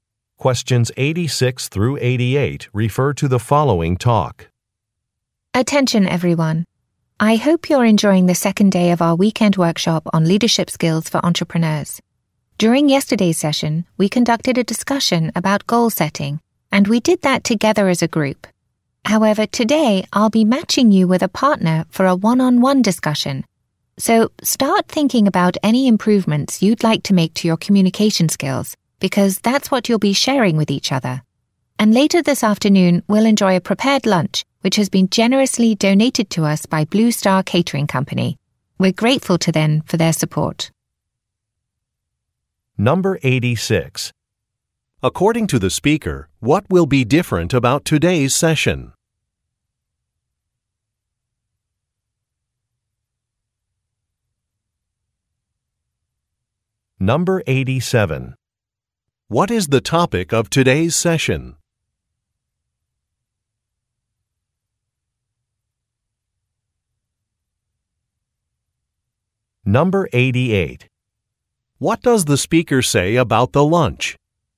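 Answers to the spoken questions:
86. Participants will work with a partner one-on-one instead of as a group
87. Communication skills
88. It was donated by Blue Star Catering Company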